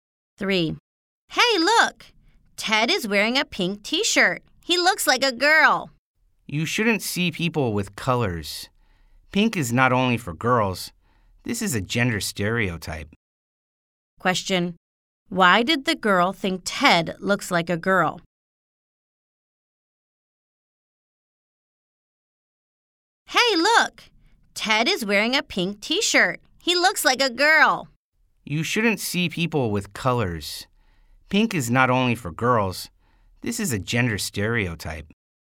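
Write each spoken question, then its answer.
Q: Why did the girl think Ted looks like a girl?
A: Because he is wearing a pink T-shirt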